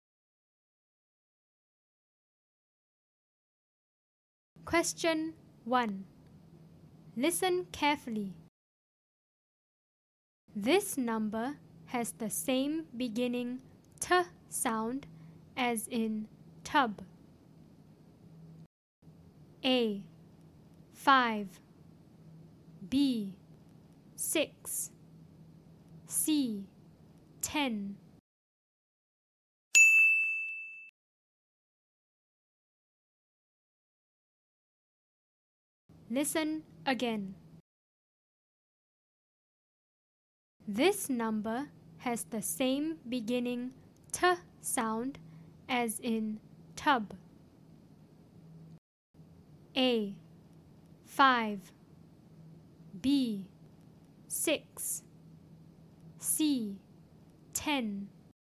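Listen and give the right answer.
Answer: C: 10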